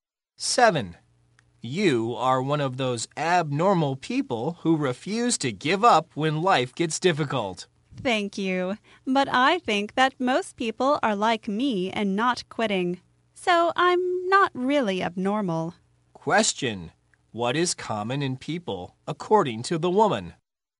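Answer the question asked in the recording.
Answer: Not quitting when life gets difficult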